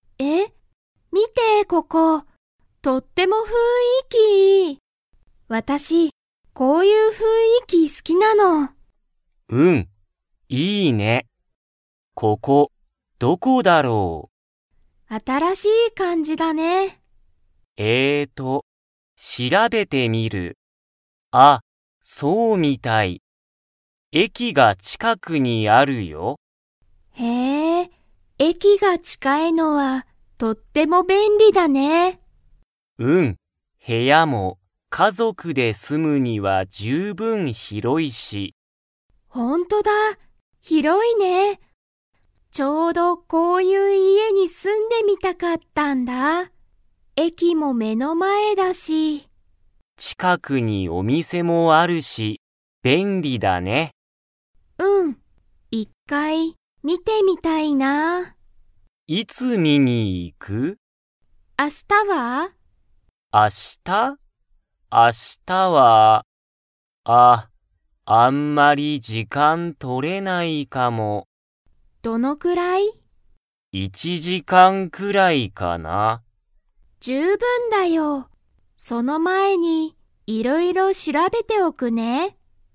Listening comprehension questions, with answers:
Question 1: ジュンとヒロミが見みつけた家いえは、駅えきが 。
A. 遠とおい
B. 近ちかい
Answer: 近ちかい

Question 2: ジュンとヒロミは、いつ家いえを見みに行いきますか?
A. 今日きょう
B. 明日あした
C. 明後日あさって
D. 来週らいしゅう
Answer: 明日あした

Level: Level 3

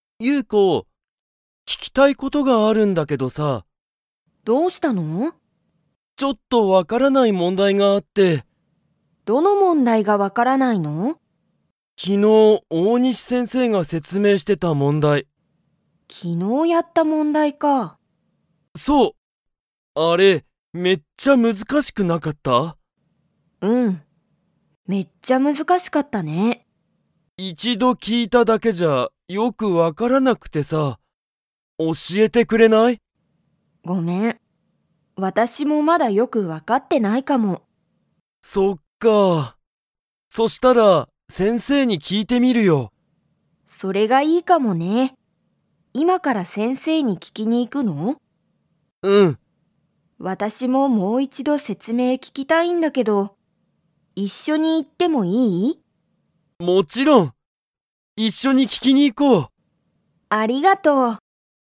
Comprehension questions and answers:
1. ケントは、分わからない問題もんだいがありますか?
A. はい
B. いいえ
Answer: はい

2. ケントとユウコは、____先生せんせいに聞ききに行いく。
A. 昨日きのう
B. 前まえに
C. 毎日まいにち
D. 今いまから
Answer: 今いまから

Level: Level 2

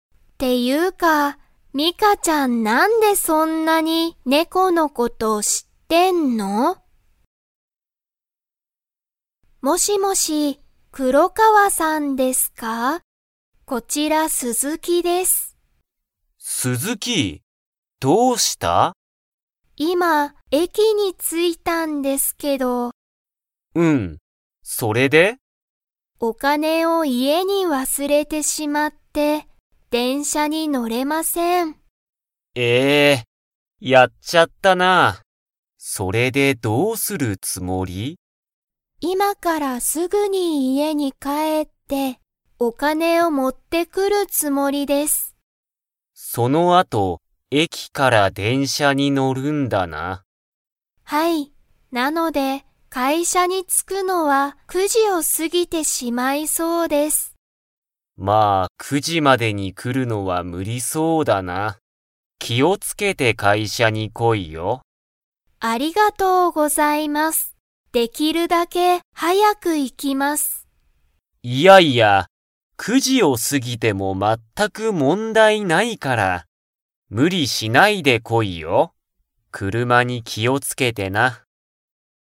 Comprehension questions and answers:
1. 鈴木すずきさんは、家いえに何なにを忘わすれましたか?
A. チケット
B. 仕事しごと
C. お金かね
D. 電車でんしゃ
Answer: お金かね

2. 鈴木すずきさんは、9時じまでに会社かいしゃに 。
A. 着つきそう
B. 着つかなそう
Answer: 着つかなそう

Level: Level 3

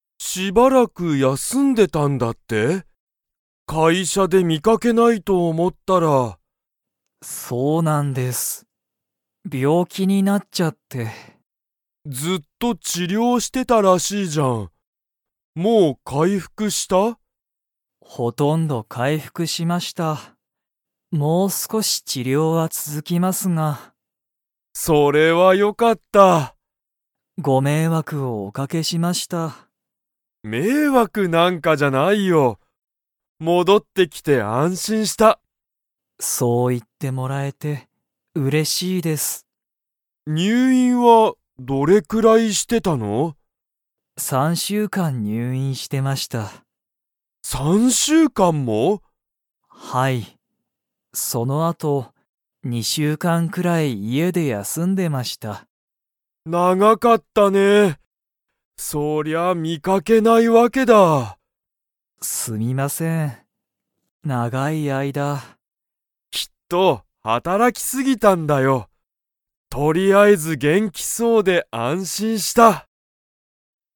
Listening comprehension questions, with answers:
Comprehension Quiz (Skip if you don't understand the conversation yet)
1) 鈴木すずきさんは、 。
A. ほとんど回復かいふくした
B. 全まったく回復かいふくしていない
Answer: ほとんど回復かいふくした

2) 鈴木すずきさんは、どれくらい入院にゅういんしていましたか?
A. 一週間いっしゅうかん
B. 二週間にしゅうかん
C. 三週間さんしゅうかん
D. 四週間よんしゅうかん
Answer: 三週間さんしゅうかん

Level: Level 4

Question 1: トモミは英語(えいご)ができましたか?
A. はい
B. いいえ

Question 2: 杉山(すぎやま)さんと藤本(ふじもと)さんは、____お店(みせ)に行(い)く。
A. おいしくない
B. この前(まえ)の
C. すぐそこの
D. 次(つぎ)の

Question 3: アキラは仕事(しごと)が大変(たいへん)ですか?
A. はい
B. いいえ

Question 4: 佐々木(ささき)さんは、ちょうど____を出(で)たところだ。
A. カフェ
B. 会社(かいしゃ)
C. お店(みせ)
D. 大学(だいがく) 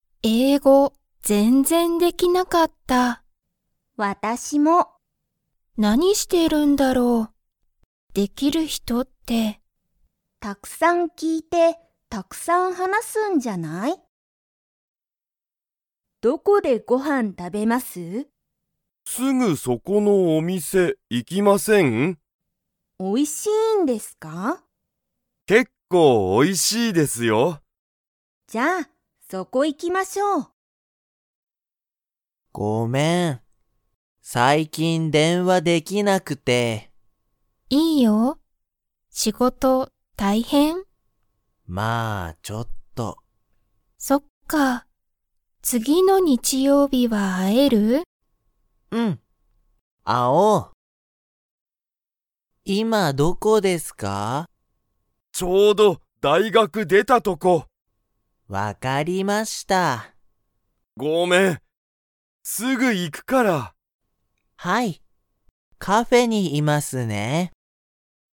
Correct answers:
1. いいえ
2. すぐそこの
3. はい
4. 大学(だいがく)

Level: Level 1

